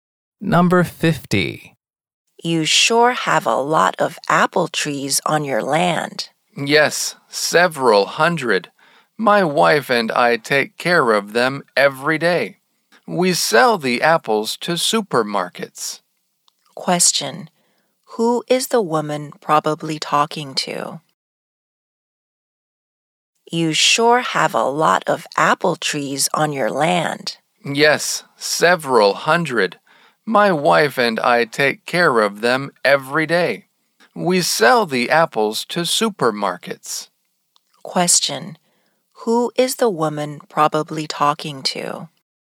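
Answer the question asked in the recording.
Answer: An apple farmer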